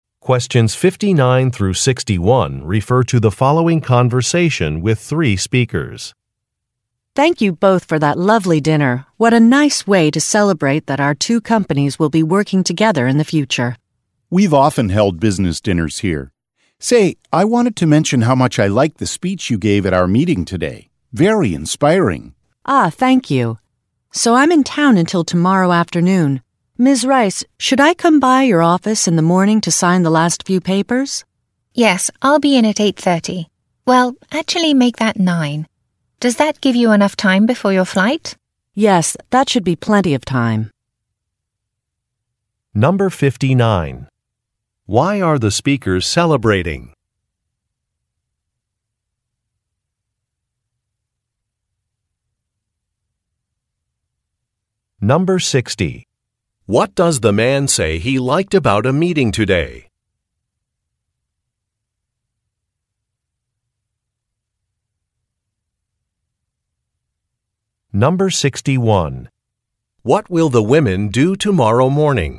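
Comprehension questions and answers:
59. Why are the speakers celebrating?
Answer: Their companies will be working together.

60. What does the man say he liked about a meeting today?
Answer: A speech that was given

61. What will the women do tomorrow morning?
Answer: Finalize some paperwork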